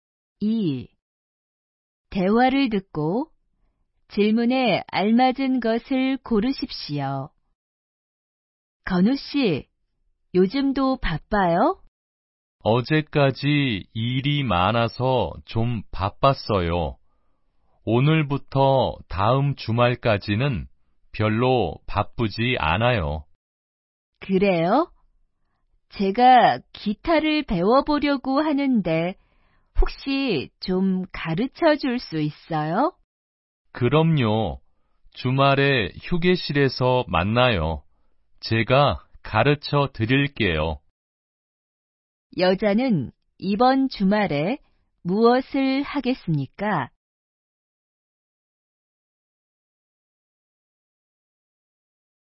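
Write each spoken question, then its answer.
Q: 여자는 이번 주말에 무엇을 하겠습니까?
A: 건우 씨에게 휴게실에서 기타를 배울 거예요.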